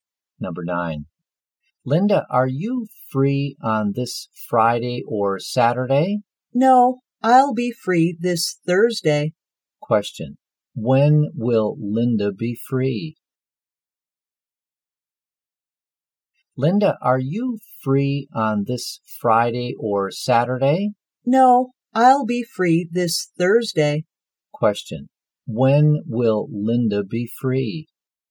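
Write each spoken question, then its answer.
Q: When will Linda be free?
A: This Thursday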